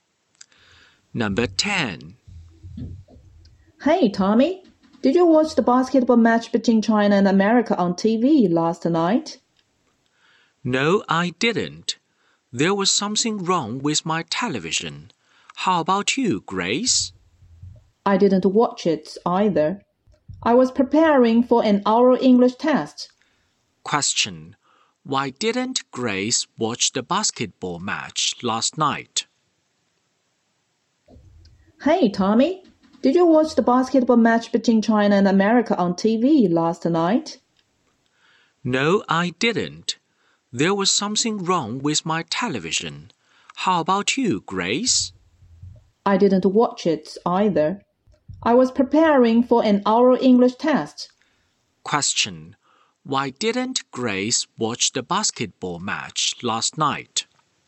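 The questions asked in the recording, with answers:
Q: Why didn't Grace watch the basketball match last night?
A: She was preparing for an oral English test.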